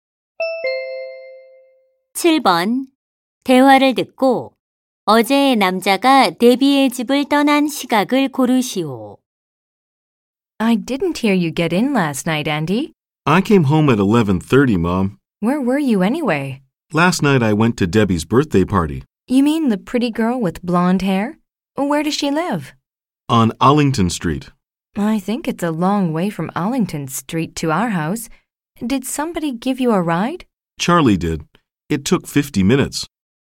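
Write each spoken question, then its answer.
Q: 대화를 듣고 어제 남자가 데비의 집을 떠난 시각을 고르시오.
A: 10시 40분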